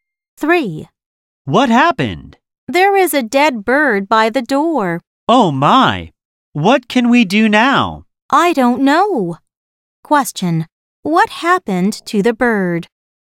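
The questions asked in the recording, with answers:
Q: What happened to the bird?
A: It died (it is dead by the door)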